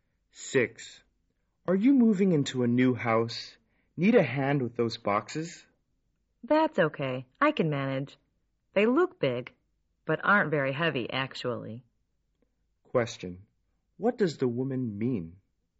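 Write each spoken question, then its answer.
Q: What does the woman mean?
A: She doesn't need help; the boxes aren't heavy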